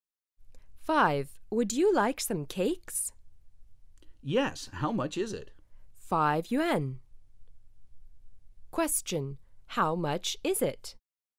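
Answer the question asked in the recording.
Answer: 5 yuan.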